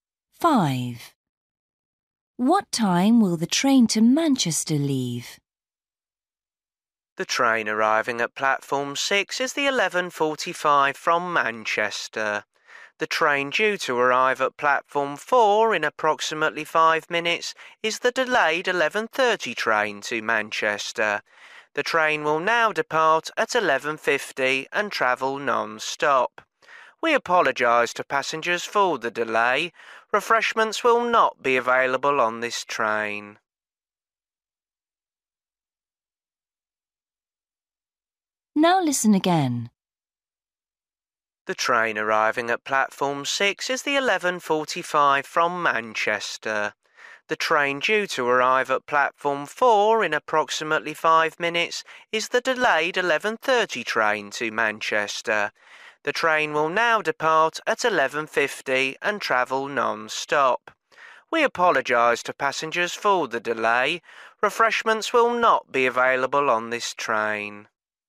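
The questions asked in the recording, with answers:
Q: What time will the train to Manchester leave?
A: 11:50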